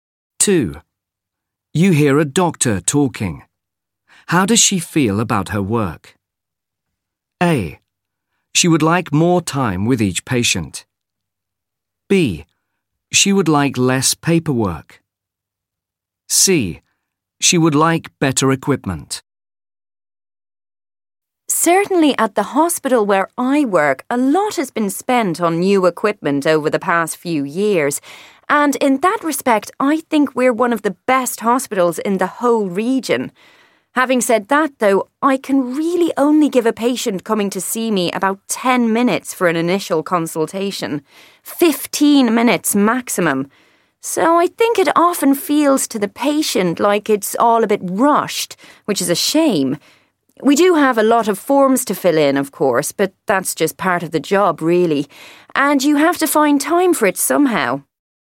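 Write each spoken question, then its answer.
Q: How does she feel about her work?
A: A: She would like more time with each patient.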